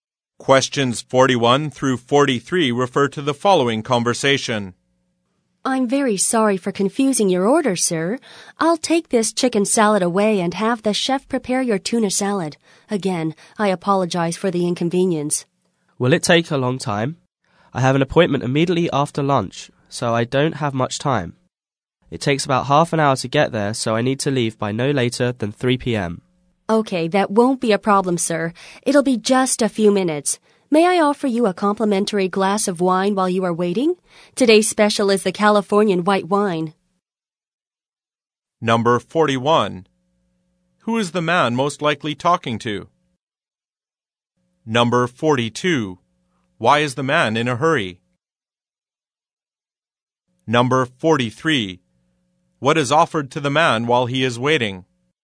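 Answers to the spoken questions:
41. A server at a restaurant
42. He has an appointment right after lunch
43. A free glass of wine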